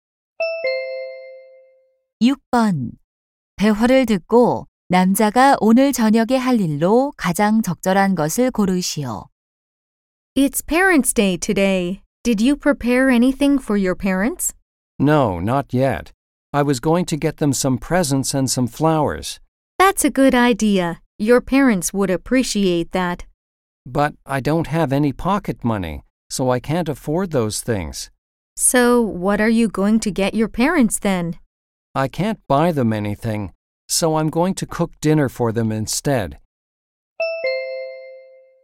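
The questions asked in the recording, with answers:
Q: 대화를 듣고 남자가 오늘 저녁에 할 일로 가장 적절한 것을 고르시오.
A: 부모님께 저녁 요리해 드리기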